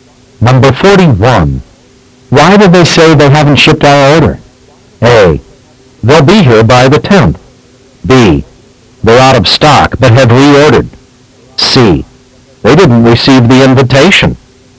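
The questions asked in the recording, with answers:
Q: Why did they say they haven't shipped our order?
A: B: They're out of stock but have reordered.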